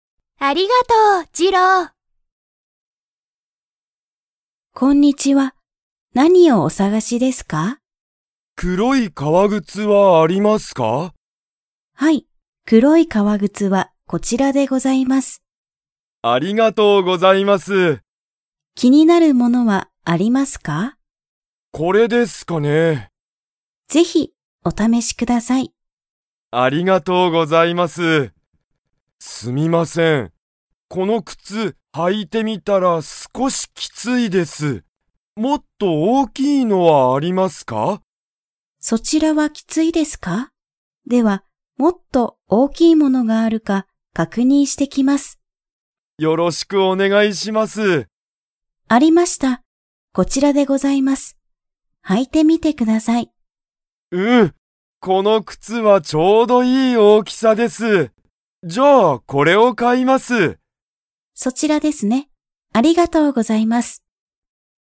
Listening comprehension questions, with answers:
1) テツヤが初はじめに履はいた靴くつは 。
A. きつかった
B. 大おおきかった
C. 黒くろくなかった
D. 高たかかった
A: A. きつかった

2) テツヤはこのお店みせで靴くつを 。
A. 買かう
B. 買かわない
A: A. 買かう

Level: Level 4

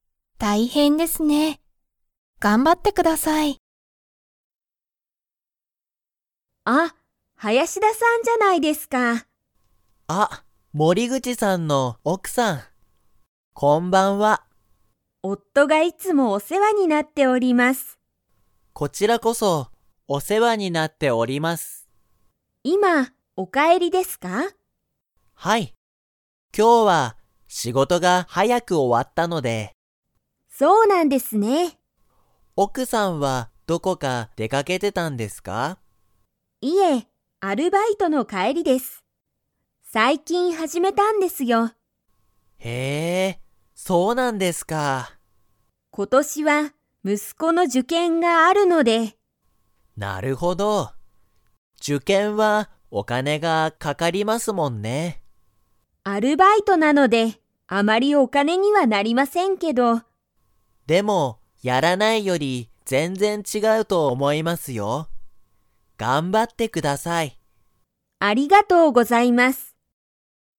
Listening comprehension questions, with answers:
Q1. 林田はやしださんは仕事しごとが 。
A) 終おわった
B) 終おわってない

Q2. 森口もりぐちさんの奥おくさんは、最近さいきん何なにを始はじめましたか?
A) 受験じゅけん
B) 趣味しゅみ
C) パソコン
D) アルバイト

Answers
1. A) 終おわった
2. D) アルバイト

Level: Level 4

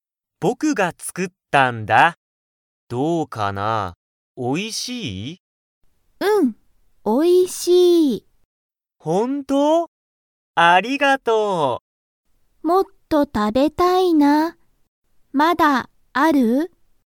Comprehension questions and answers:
Comprehension Quiz (Skip if you don't understand the conversation yet)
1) ユミはもっと食(た)べたいですか?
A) はい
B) いいえ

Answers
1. A) はい

